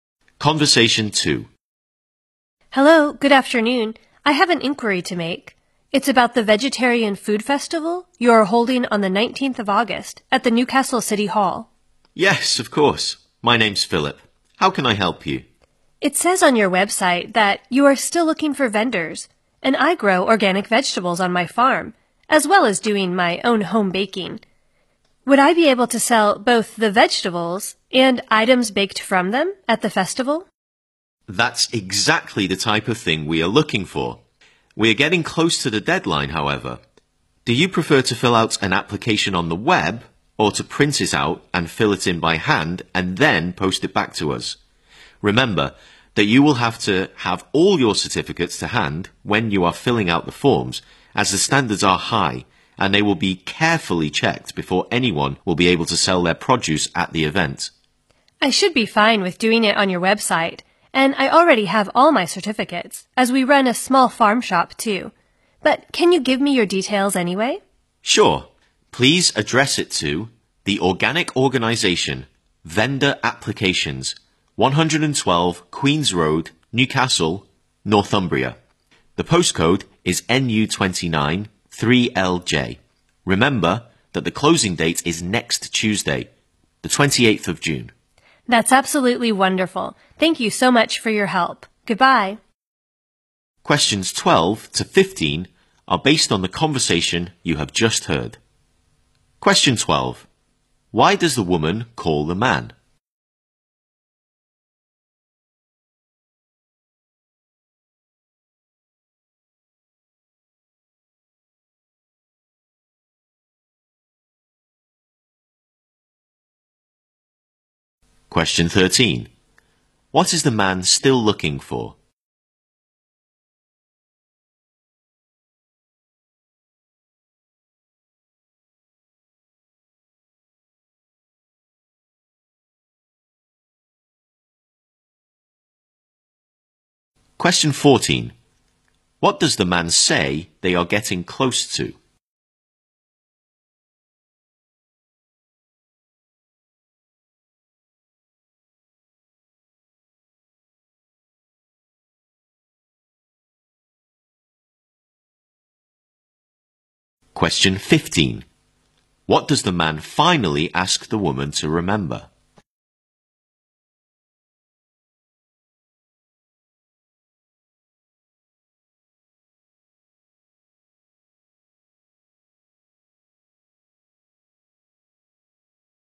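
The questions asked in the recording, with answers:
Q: Why does the woman call the man?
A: To ask about selling her vegetables and baked goods at the Vegetarian Food Festival

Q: What is the man still looking for?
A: Vendors

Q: What does the man say they are getting close to?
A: The deadline

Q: What does the man finally ask the woman to remember?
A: The closing date is next Tuesday, the 28th of June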